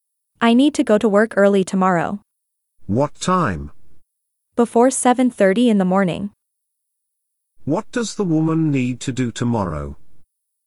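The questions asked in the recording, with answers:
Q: What does the woman need to do tomorrow?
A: Go to work early, before 7:30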